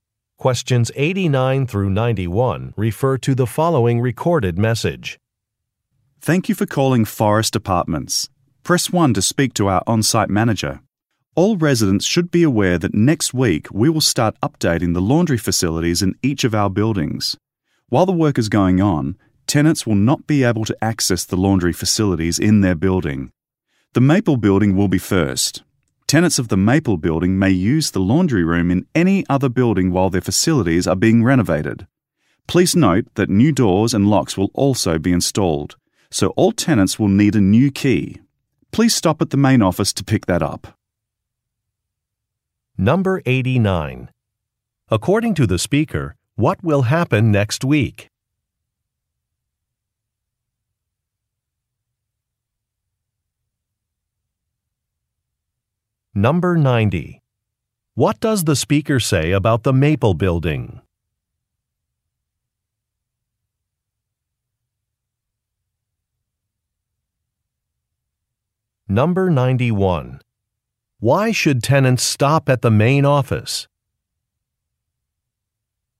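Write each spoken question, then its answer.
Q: According to the speaker, what will happen next week?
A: Laundry facilities will be updated

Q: What does the speaker say about the Maple Building?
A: It will be renovated first

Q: Why should tenants stop at the main office?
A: To pick up a new key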